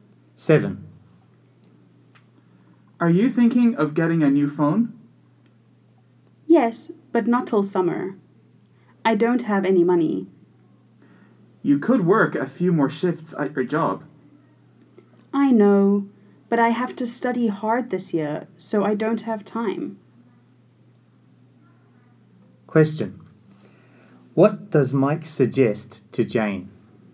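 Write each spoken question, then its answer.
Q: What does Mike suggest to Jane?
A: Work a few more shifts at her job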